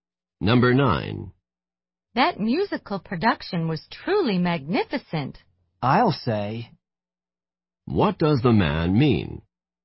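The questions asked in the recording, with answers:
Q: What does the man mean?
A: He agrees that the production was magnificent.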